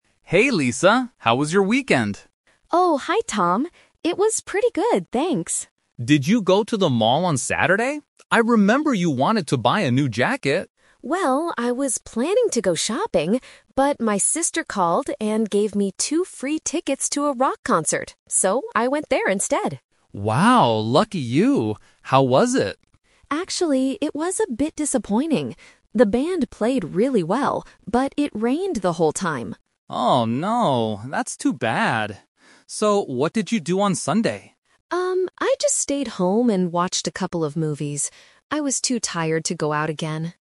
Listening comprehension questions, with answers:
Listen to the conversation between two classmates and circle the correct answer for each question.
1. What did Lisa do on Saturday?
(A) She went shopping for a new jacket.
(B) She went to a rock concert.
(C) She bought tickets for a movie.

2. How did Lisa feel about the event on Saturday?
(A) She was a little disappointed.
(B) She thought the band played badly.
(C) She loved the rainy weather.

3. What did Lisa do on Sunday?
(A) She went to the cinema with her sister.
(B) She went out to the mall.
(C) She watched movies at home.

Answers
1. B
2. A
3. C

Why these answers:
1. Lisa says, "But my sister called and gave me two free tickets to a rock concert. So, I went there instead." Option (A) is the trap; she planned to go shopping, but her plans changed (The Twist). Option (C) is incorrect because she got the tickets for free, and they were for a concert, not a movie.
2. Lisa explicitly states, "Actually, it was a bit disappointing." Option (B) is a trap; she mentions that "The band played really well," so she didn't think they played badly. Option (C) is incorrect because the rain is exactly what made her disappointed.
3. Lisa says, "I just stayed home and watched a couple of movies." Option (A) is a trap; she watched movies, but she did it at home, not at the cinema. Option (B) is a trap using a location mentioned earlier in the conversation (the mall), but she did not go there.

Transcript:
Tom: Hey, Lisa. How was your weekend?
Lisa: Oh, hi Tom. It was pretty good, thanks.
Tom: Did you go to the mall on Saturday? I remember you wanted to buy a new jacket.
Lisa: Well, I was planning to go shopping. But my sister called and gave me two free tickets to a rock concert. So, I went there instead.
Tom: Wow, lucky you! How was it?
Lisa: Actually, it was a bit disappointing. The band played really well, but it rained the whole time.
Tom: Oh, no. That's too bad. So what did you do on Sunday?
Lisa: Um, I just stayed home and watched a couple of movies. I was too tired to go out again.

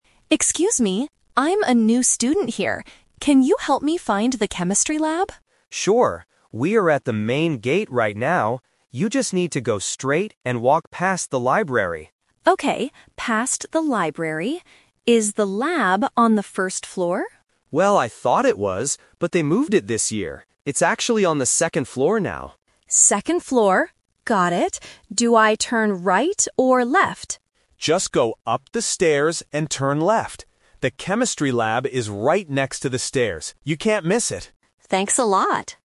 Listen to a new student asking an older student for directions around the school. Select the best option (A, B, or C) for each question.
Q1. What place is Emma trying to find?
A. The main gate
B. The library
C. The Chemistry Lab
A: C

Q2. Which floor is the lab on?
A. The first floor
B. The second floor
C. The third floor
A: B

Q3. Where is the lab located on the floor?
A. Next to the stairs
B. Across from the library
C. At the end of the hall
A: A

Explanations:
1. Emma asks clearly at the beginning, "Can you help me find the Chemistry Lab?" Why the traps are wrong: Option (A) is where they are standing right now ("We are at the main gate right now"). Option (B) is "The Trap" (a landmark). Liam tells her to walk past the library, but it is not her destination.
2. Liam explains the new location: "It's actually on the second floor now." Why the traps are wrong: Option (A) is "The Twist Trap". Emma asks if it is on the first floor, and Liam admits he thought so too, but they moved it. Option (C) is a plausible floor number but is never mentioned.
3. Liam gives the exact location: "The Chemistry Lab is right next to the stairs." Why the traps are wrong: Option (B) is a trap using a previously mentioned location (the library), but they do not say it is across from it. Option (C) is a plausible location for a school room, but it is not mentioned in the audio.

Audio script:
Emma: Excuse me, I'm a new student here. Can you help me find the Chemistry Lab?
Liam: Sure! We are at the main gate right now. You just need to go straight and walk past the library.
Emma: Okay, past the library. Is the lab on the first floor?
Liam: Well, I thought it was, but they moved it this year. It's actually on the second floor now.
Emma: Second floor. Got it. Do I turn right or left?
Liam: Just go up the stairs, and turn left.

